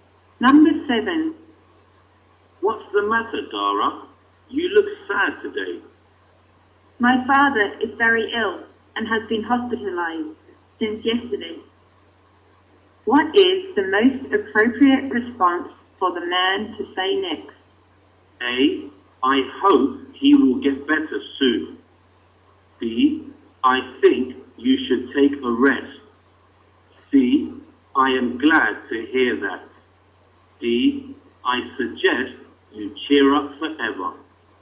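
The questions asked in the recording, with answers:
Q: What is the most appropriate response for the man to say next?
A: A: I hope he will get better soon.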